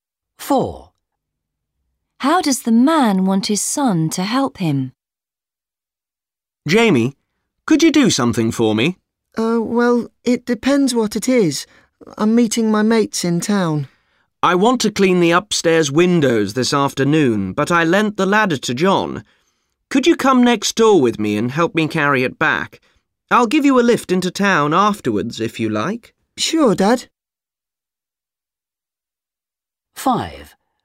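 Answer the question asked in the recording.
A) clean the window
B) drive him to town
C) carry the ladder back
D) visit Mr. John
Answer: C) carry the ladder back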